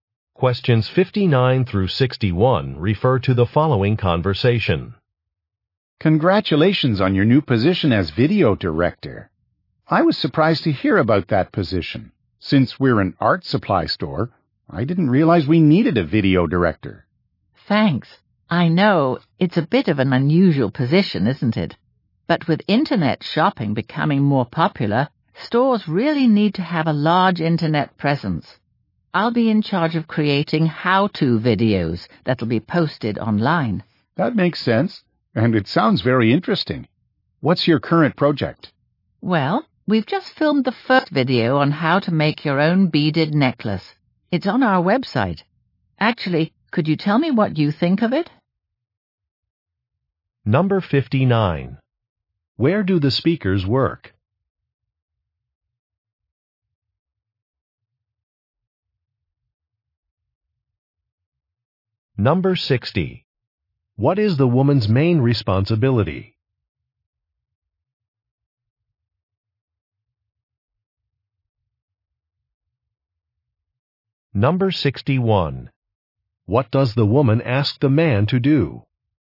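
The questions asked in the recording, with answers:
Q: Where do the speakers work?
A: At an art supply store

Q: What is the woman's main responsibility?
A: Making how-to videos to post online

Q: What does the woman ask the man to do?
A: Give his opinion of her video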